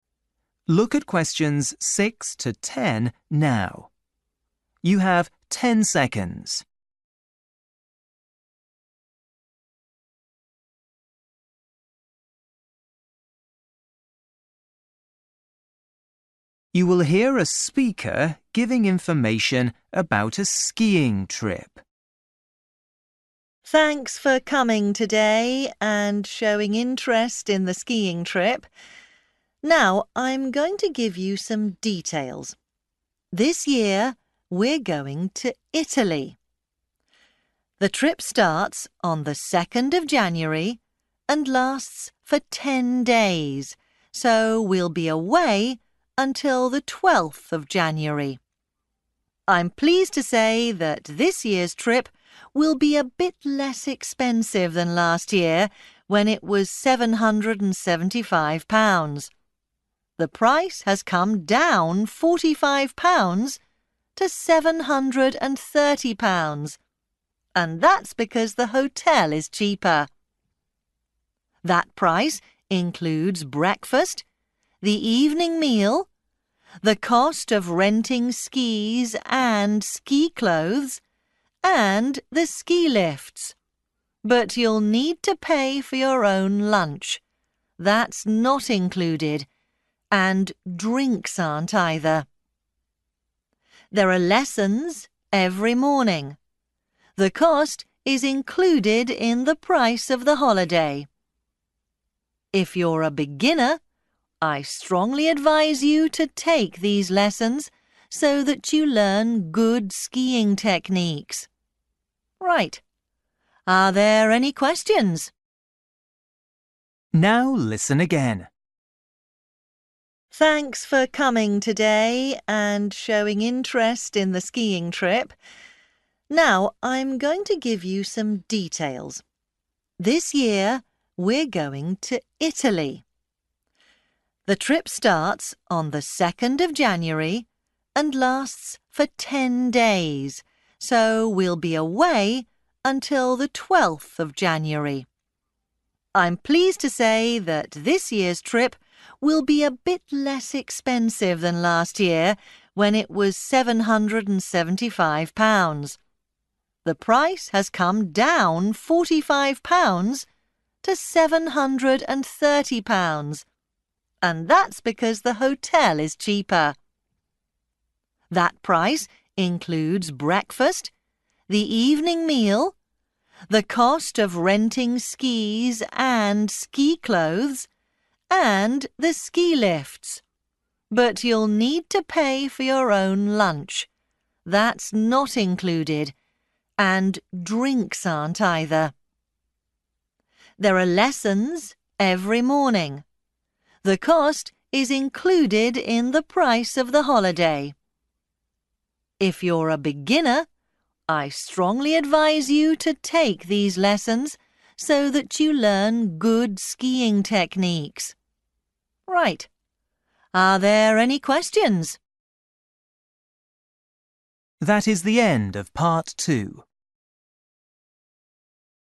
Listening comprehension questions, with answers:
For each question, write the correct answer in the gap. Write one word or a number or a date or a time.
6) 2nd – (6) ............... January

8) Lunch and (8) ...............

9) Every (9) ...............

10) (10) ...............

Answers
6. 12th
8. drinks
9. morning
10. beginners

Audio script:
Woman: Thanks for coming today and showing interest in the skiing trip. Now, I'm going to give you some details. This year we're going to Italy.
The trip starts on the second of January and lasts for ten days, so we'll be away until the twelfth of January. I'm pleased to say that this year trip will be a bit less expensive than last year, when it was £775. The price has come down £45 to £730, and that's because the hotel is cheaper.
That price includes breakfast, the evening meal, the cost of renting skis and ski clothes, and the ski lifts. But you'll need to pay for your own lunch. That's not included, and drinks aren't, either.
There are lessons every morning. The cost is included in the price of the holiday. If you're a beginner, I strongly advise you to take these lessons so that you learn good skiing techniques. Right, are there any questions?
Now listen again.

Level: KET (A2)